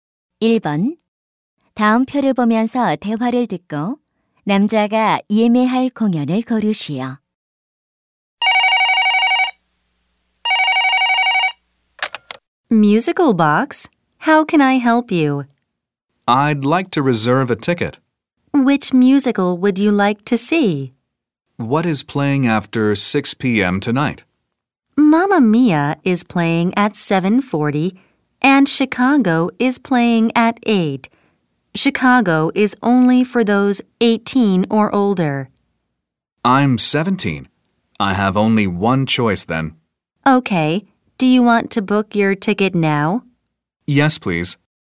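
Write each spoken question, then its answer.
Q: 다음 표를 보면서 대화를 듣고 남자가 예매할 공연을 고르시오.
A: Mamma Mia (7:40)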